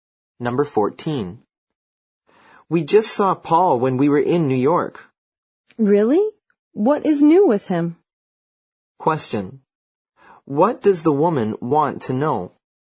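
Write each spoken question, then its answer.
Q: What does the woman want to know?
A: What is new with Paul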